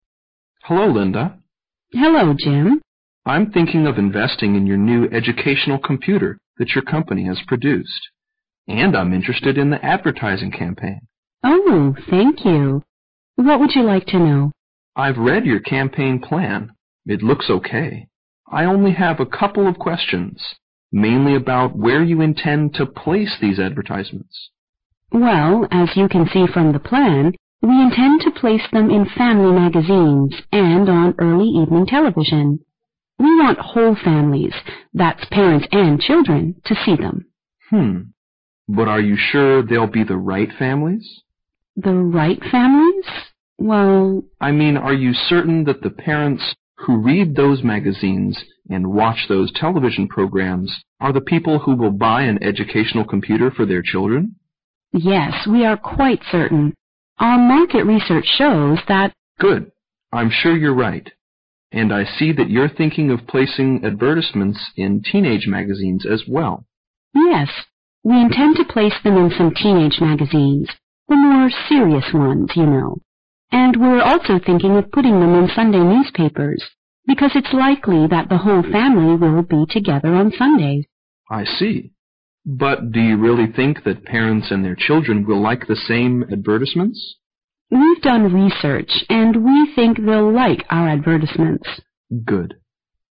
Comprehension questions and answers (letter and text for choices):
Questions 14 to 17 are based on the following conversation. At the end of the conversation, you will be given 15 seconds to answer the questions. Now listen to the conversation.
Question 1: The advertisements will be placed in all the following EXCEPT ______.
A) family magazines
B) Sunday newspapers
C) morning television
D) teenage magazines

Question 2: The advertisements are intended to be seen by ______.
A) parents only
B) children only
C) school teachers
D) whole families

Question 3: Linda sounds ______ about the success of the campaign plan.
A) confident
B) hesitant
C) uncertain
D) delighted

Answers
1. C) morning television
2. D) whole families
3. A) confident

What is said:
[听力原文] M: Hello Linda. W: Hello Jim. M: I'm thinking of investing in your new educational computer that your company has produced. And I'm interested in the advertising campaign. W: Oh, thank you. What would you like to know? M: I've read your campaign plan. It looks OK. I only have a couple of questions, mainly about where you intend to place these advertisements. W: Well, as you can see from the plan, we intend to place them in family magazines and on early evening television. We want whole families that parents and children to see them. M: Mmm...but are you sure they'll be the right families? W: The right families? Well... M: I mean are you certain that the parents who read those magazines and watch those television programs are the people who will buy an educational computer for their children? W: Yes, we are quite certain. A market research shows that... M: Good. I'm sure you're right. And I see that you're thinking of placing advertisements in teenage magazines as well. W: Yes, we intend to place them in some teenage magazines, the more serious ones, you know. And we're also thinking of putting them in Sunday newspapers because it's likely that the whole family will be together on Sundays. M: I see, but do you really think that the parents and children will like the same advertisements? W: We've done the research and we think they'll like our advertisements. M: Good.